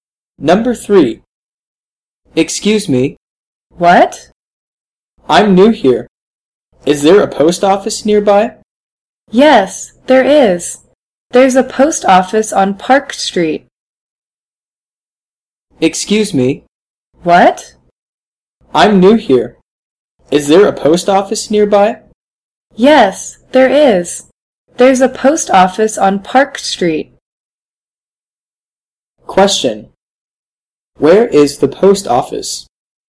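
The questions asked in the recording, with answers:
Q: Where is the post office?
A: On Park Street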